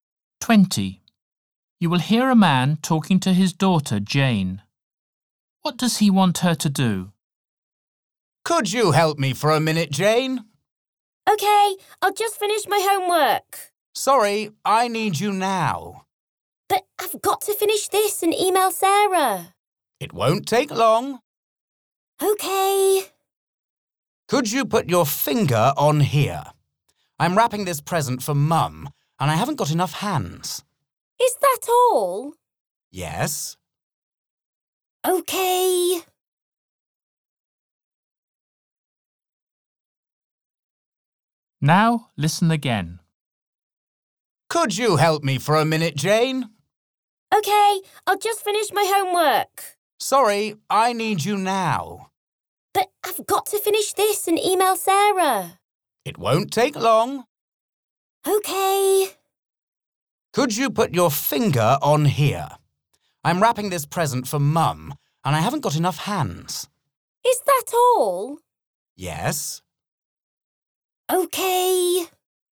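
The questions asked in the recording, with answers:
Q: What does he want her to do?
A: put her finger on the present while he wraps it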